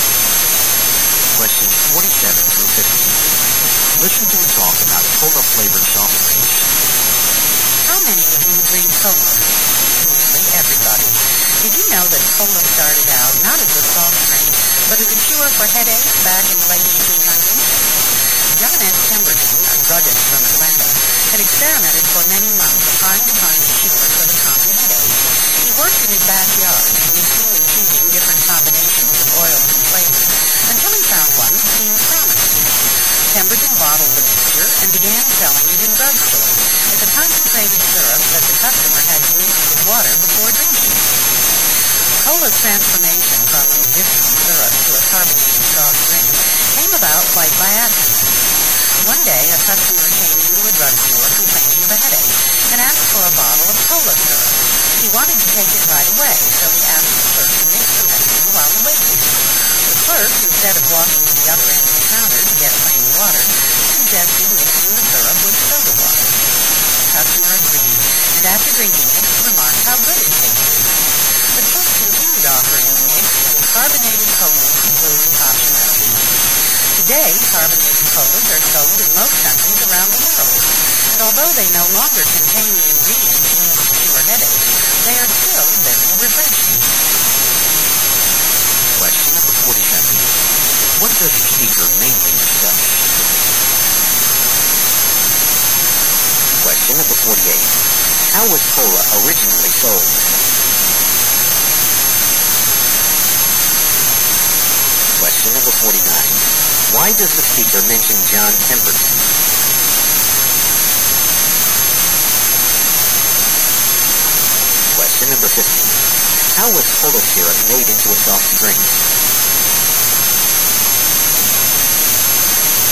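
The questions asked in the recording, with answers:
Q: What does a speaker mainly discuss?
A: How cola started as a headache cure and became a soft drink

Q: How was cola originally sold?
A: As a concentrated syrup in drugstores, to be mixed with water

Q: Why does the speaker mention John Pemberton?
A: He invented cola

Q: How was cola syrup made into a soft drink?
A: A clerk mixed it with soda water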